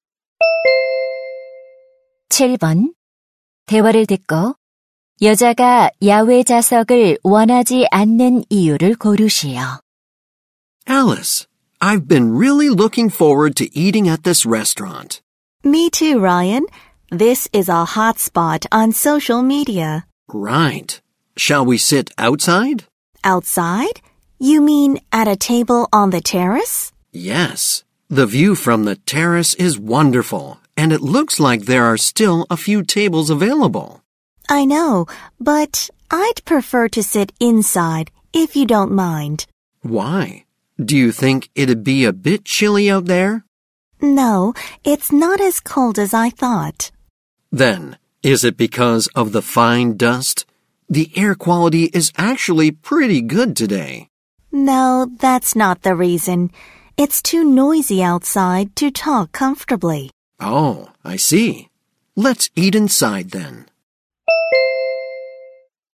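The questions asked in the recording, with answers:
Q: 대화를 듣고 여자가 야외 자석을 원하지 않는 이유를 고르시오.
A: 밖이 너무 시끄러워 편하게 대화할 수 없어서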